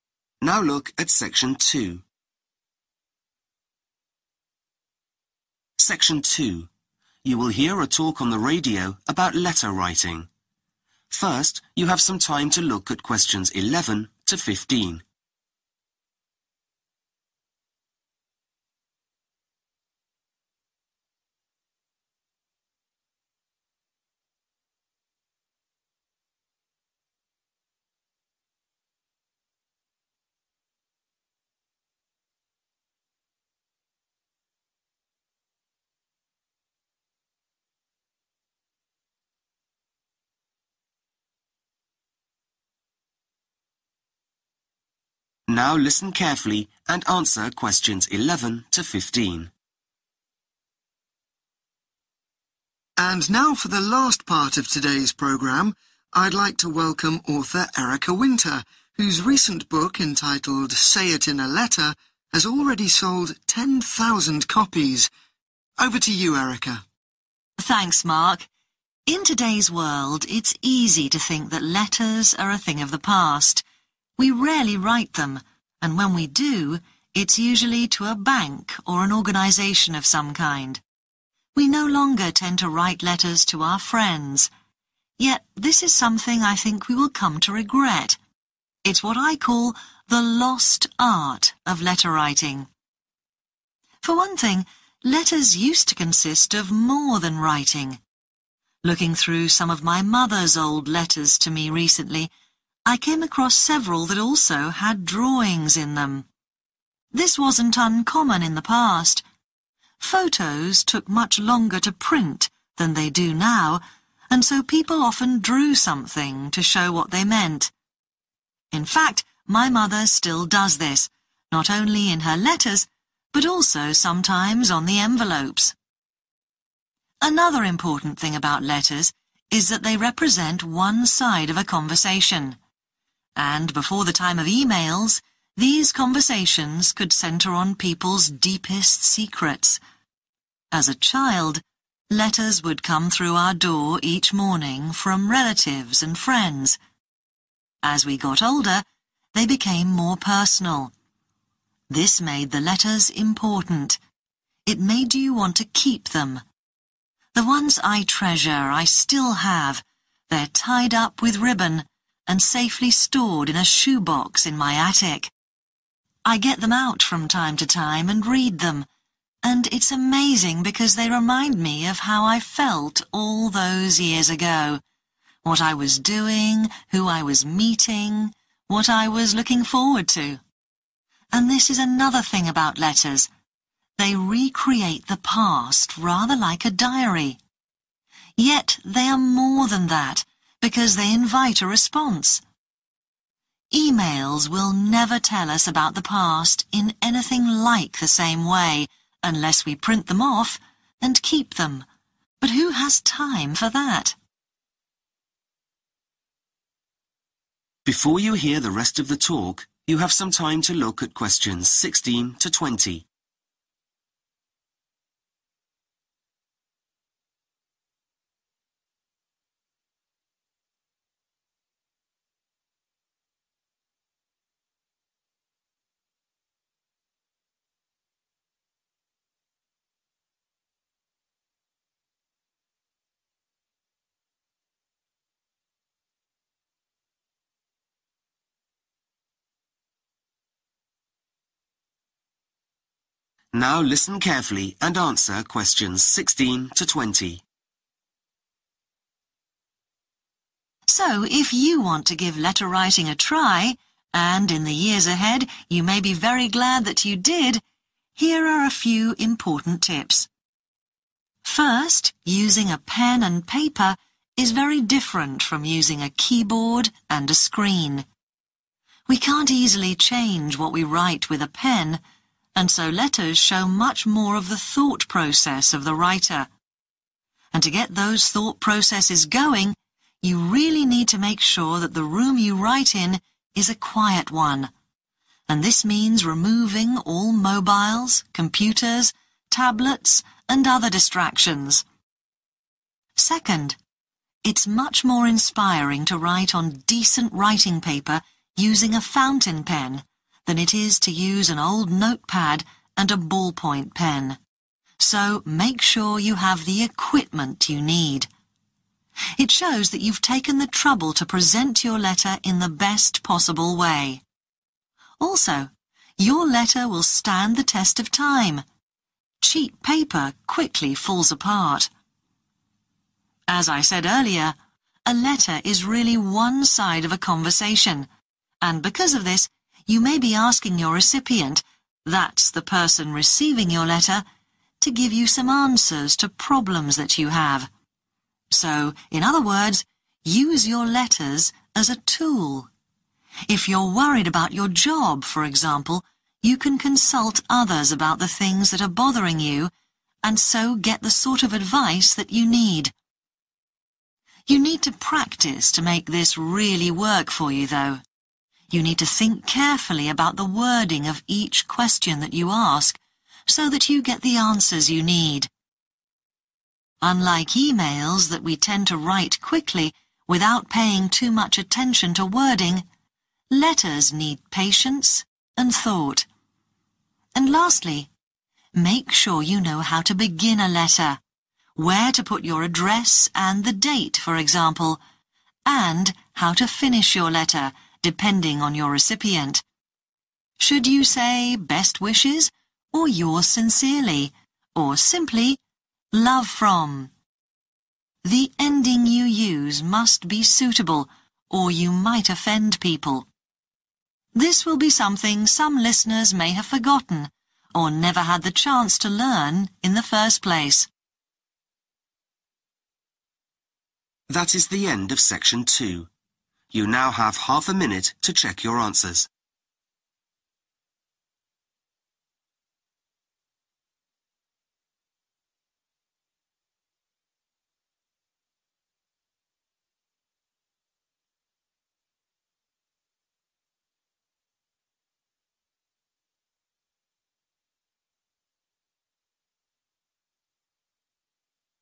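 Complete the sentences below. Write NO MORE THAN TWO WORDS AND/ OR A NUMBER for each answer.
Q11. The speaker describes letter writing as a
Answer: lost art

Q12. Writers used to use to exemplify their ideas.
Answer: drawings

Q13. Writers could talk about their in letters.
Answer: deepest secrets

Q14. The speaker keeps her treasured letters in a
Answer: shoebox

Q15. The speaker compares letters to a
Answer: diary

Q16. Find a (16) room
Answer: quiet

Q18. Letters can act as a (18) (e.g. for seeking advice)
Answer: tool

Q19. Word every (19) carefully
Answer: question

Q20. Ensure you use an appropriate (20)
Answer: ending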